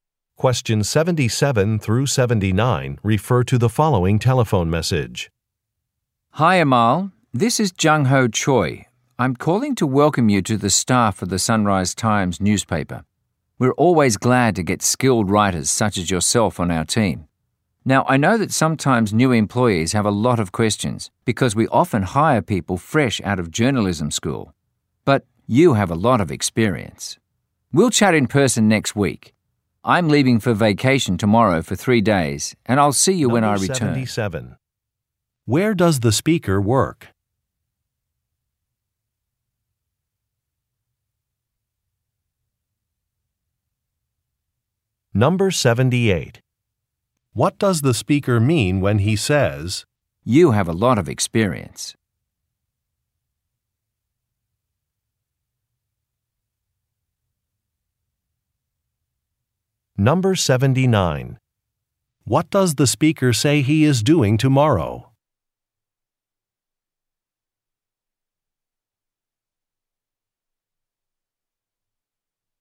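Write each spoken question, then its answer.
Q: Where does the speaker work?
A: At a newspaper (the Sunrise Times)

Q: What does the speaker say he is doing tomorrow?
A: Leaving for a 3-day vacation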